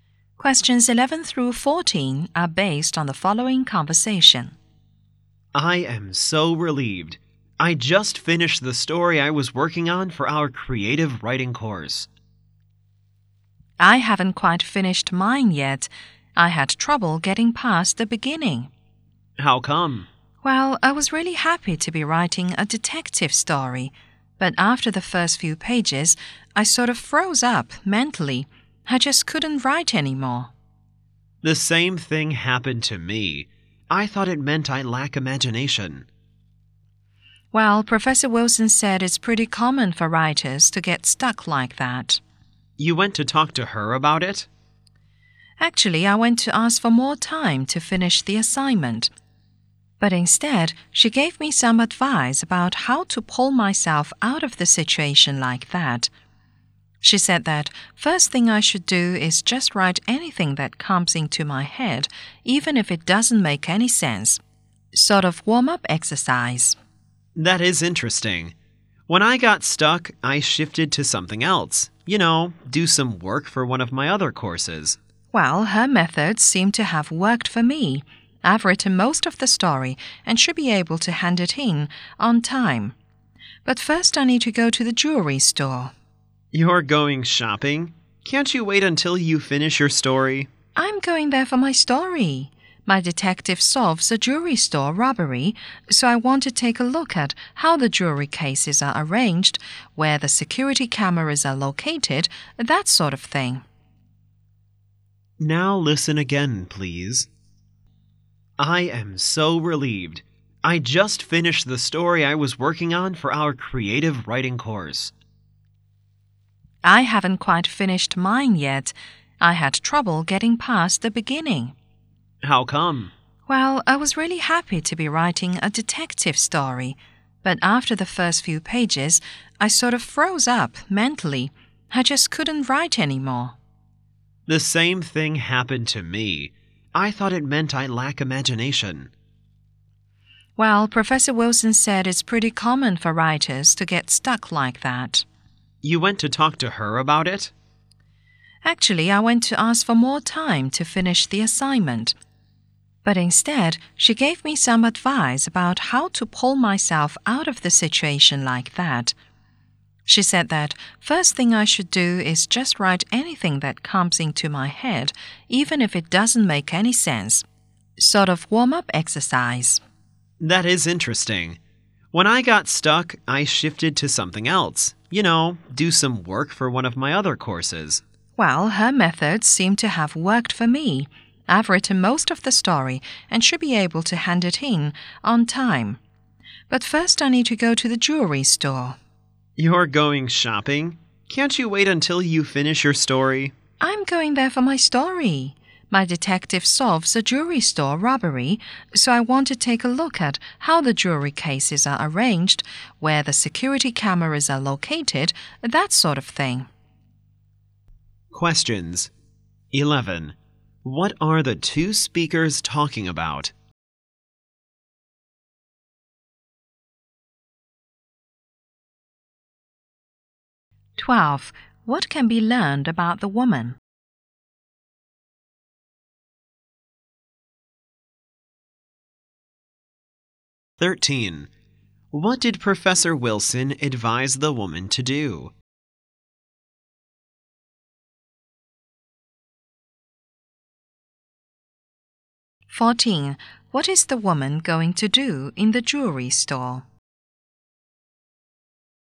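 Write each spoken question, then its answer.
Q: What are the two speakers talking about?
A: The stories they are writing for their creative writing course

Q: What did Professor Wilson advise the woman to do?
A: Write anything that comes into her head as a warm-up

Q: What is the woman going to do in the jewelry store?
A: See how the jewelry cases and security cameras are arranged, for her story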